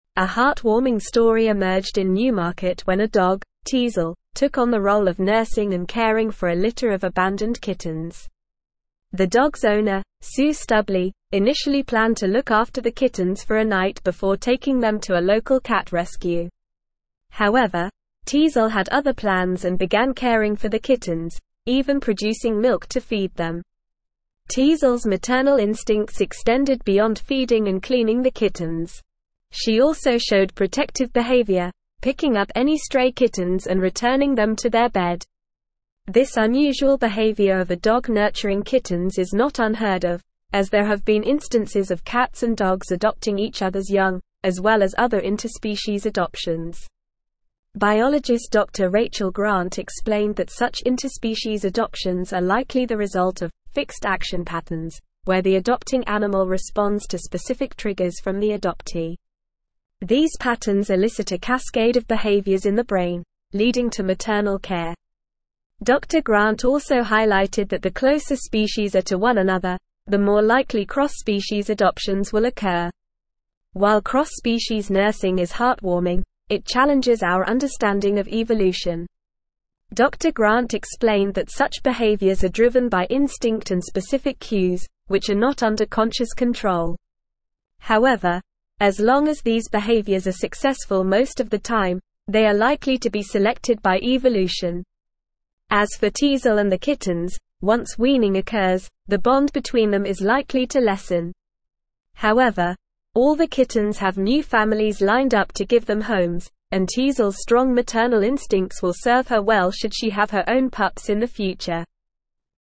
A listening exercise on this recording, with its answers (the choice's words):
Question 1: What is the name of the dog who took on the role of nursing and caring for a litter of abandoned kittens?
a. Daisy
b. Teasel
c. Max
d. Buddy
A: Teasel

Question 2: What did the dog, Teasel, do to care for the abandoned kittens?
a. Took them for walks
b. Played fetch with them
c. Produced milk to feed them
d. Ignored them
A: Produced milk to feed them

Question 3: What did Teasel do when she found any stray kittens?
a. Ignored them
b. Took them for a walk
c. Played with them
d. Returned them to their bed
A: Returned them to their bed

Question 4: According to biologist Dr. Rachel Grant, what triggers interspecies adoptions?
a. Random chance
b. Evolutionary pressure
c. Human intervention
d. Fixed action patterns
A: Fixed action patterns

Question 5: What did Dr. Grant say is likely to occur when weaning occurs between Teasel and the kittens?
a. They will become even closer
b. The bond between them is likely to lessen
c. Teasel will adopt more kittens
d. The kittens will leave Teasel for good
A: The bond between them is likely to lessen

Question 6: What did Dr. Grant say drives the behaviors of cross-species nursing?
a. Instinct and specific cues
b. Conscious control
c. Human intervention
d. Random chance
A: Instinct and specific cues

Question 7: What did Dr. Grant say about behaviors like cross-species nursing in terms of evolution?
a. They are not influenced by evolution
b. They are detrimental to the survival of the species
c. They are likely to be selected by evolution if they are successful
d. They are purely random occurrences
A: They are likely to be selected by evolution if they are successful

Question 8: What is likely to happen to the kittens once they are weaned?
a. They have new families lined up to give them homes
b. They will stay with Teasel forever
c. They will be taken to a cat rescue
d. They will be released into the wild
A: They have new families lined up to give them homes

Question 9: The dog's (1)______, Sue Stubley, initially planned to look after the kittens for a (2)______ before (3)______ them to a local cat rescue.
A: owner

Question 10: The dog's (1)______, Sue Stubley, initially planned to look after the kittens for a (2)______ before (3)______ them to a local cat rescue.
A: night

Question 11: The dog's (1)______, Sue Stubley, initially planned to look after the kittens for a (2)______ before (3)______ them to a local cat rescue.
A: taking

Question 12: Teasel's maternal (4)______ extended beyond feeding and cleaning the (5)______.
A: instincts

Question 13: Teasel's maternal (4)______ extended beyond feeding and cleaning the (5)______.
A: kittens

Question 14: This (6)______ behavior of a dog nurturing kittens is not unheard of, as there have been instances of cats and dogs adopting each (7)______'s young, as well as other interspecies adoptions.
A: unusual

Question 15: Biologist Dr. Rachel (8)______ explained that such interspecies adoptions are likely the result of "fixed action patterns," where the adopting animal responds to specific triggers from the (9)______.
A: Grant

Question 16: Biologist Dr. Rachel (8)______ explained that such interspecies adoptions are likely the result of "fixed action patterns," where the adopting animal responds to specific triggers from the (9)______.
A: adoptee

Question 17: These patterns elicit a cascade of (10)______ in the brain, leading to maternal care.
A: behaviors

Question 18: Dr. Grant also highlighted that the (11)______ (12)______ are to one another, the more likely cross-species adoptions will occur.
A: closer

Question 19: However, as long as these behaviors are (13)______ most of the time, they are (14)______ to be selected by evolution.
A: successful

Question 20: However, as long as these behaviors are (13)______ most of the time, they are (14)______ to be selected by evolution.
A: likely

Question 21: However, all the kittens have new families (15)______ up to give them homes, and Teasel's strong maternal instincts will (16)______ her well should she have her own pups in the future.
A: lined

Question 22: However, all the kittens have new families (15)______ up to give them homes, and Teasel's strong maternal instincts will (16)______ her well should she have her own pups in the future.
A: serve

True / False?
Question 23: The closer species are to one another, the less likely cross-species adoptions will occur, according to Dr. Grant.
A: False

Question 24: Teasel, a cat in Newmarket, ignored a litter of abandoned kittens, refusing to produce milk to feed them.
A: False

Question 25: Once weaning occurs, the bond between Teasel and the kittens is likely to lessen, but all the kittens have new families lined up to give them homes.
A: True

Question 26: Cross-species nursing challenges our understanding of evolution, as it is driven by instinct and specific cues rather than conscious control.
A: True

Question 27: Biologist Dr. Rachel Grant explained that interspecies adoptions are likely the result of "fixed action patterns" triggering maternal care in the adopting animal.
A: True

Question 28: Interspecies adoptions, such as a dog caring for kittens, are not unheard of and have been observed in other instances.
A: True

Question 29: Teasel's owner, Sue Stubley, initially planned to take the kittens to a local cat rescue, but Teasel refused to take on the role of nursing and caring for them.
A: False

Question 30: Teasel showed neglectful behavior towards the kittens, ignoring any stray ones and leaving them alone.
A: False

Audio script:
A heartwarming story emerged in Newmarket when a dog, Teasel, took on the role of nursing and caring for a litter of abandoned kittens. The dog's owner, Sue Stubley, initially planned to look after the kittens for a night before taking them to a local cat rescue. However, Teasel had other plans and began caring for the kittens, even producing milk to feed them.
Teasel's maternal instincts extended beyond feeding and cleaning the kittens. She also showed protective behavior, picking up any stray kittens and returning them to their bed. This unusual behavior of a dog nurturing kittens is not unheard of, as there have been instances of cats and dogs adopting each other's young, as well as other interspecies adoptions.
Biologist Dr. Rachel Grant explained that such interspecies adoptions are likely the result of "fixed action patterns," where the adopting animal responds to specific triggers from the adoptee. These patterns elicit a cascade of behaviors in the brain, leading to maternal care. Dr. Grant also highlighted that the closer species are to one another, the more likely cross-species adoptions will occur.
While cross-species nursing is heartwarming, it challenges our understanding of evolution. Dr. Grant explained that such behaviors are driven by instinct and specific cues, which are not under conscious control. However, as long as these behaviors are successful most of the time, they are likely to be selected by evolution.
As for Teasel and the kittens, once weaning occurs, the bond between them is likely to lessen. However, all the kittens have new families lined up to give them homes, and Teasel's strong maternal instincts will serve her well should she have her own pups in the future.

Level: Level 4